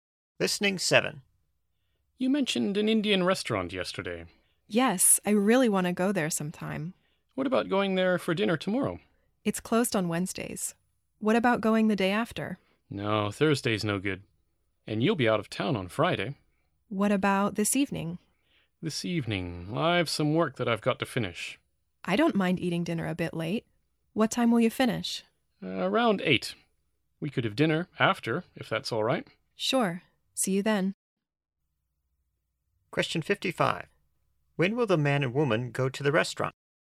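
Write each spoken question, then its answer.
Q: When will the man and woman go to the restaurant?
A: This evening, after 8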